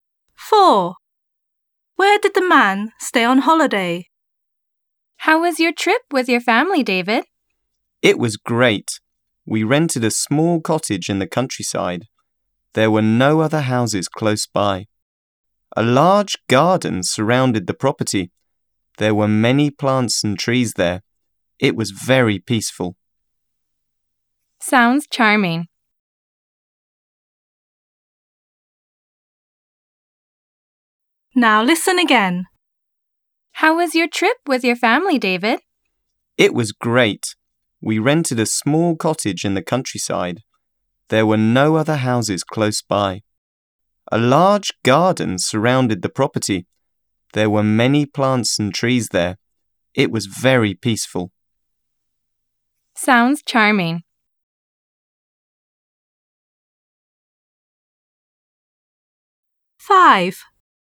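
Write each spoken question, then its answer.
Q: Where did the man stay on holiday?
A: In a small cottage in the countryside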